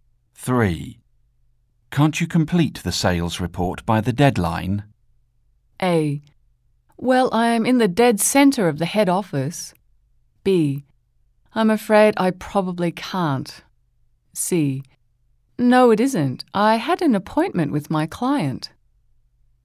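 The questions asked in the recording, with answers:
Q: Can't you complete the sales report by the deadline?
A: B: I'm afraid I probably can't.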